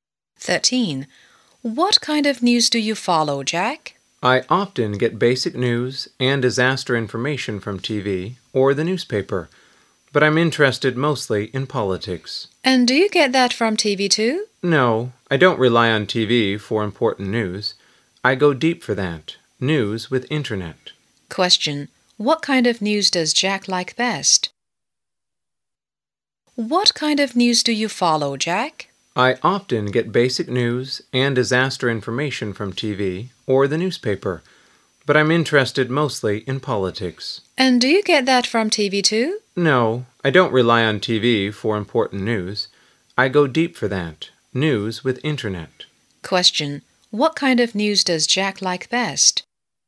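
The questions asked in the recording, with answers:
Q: Question. What kind of news does Jack like best?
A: Politics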